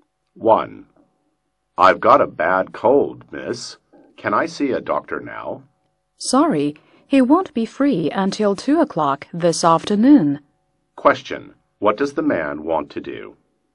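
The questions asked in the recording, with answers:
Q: What does the man want to do?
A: See a doctor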